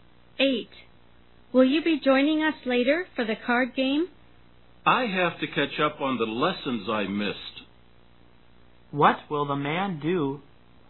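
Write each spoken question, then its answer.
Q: What will the man do?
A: Catch up on the lessons he missed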